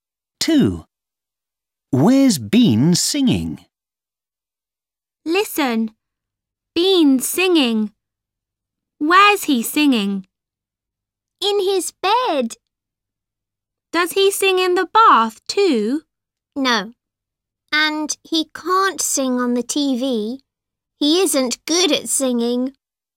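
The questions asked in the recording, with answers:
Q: Where's Bean singing?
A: In his bed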